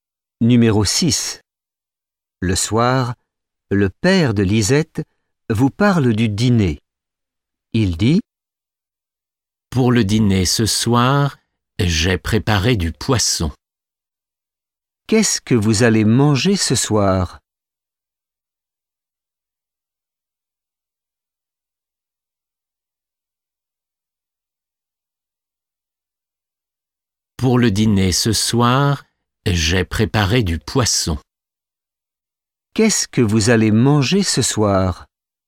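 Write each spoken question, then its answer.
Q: « Qu'est-ce que vous allez manger ce soir ? »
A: Du poisson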